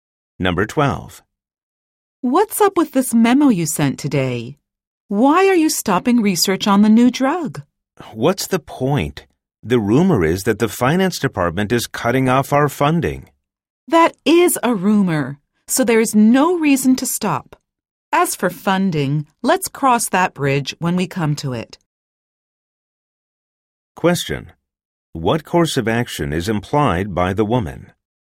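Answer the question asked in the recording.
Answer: Continue the research on the new drug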